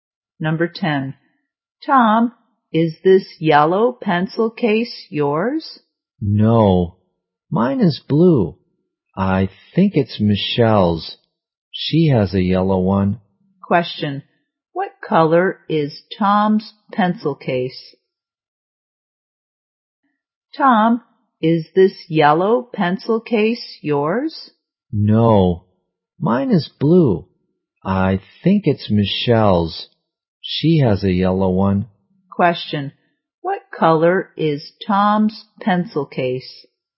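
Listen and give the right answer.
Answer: Blue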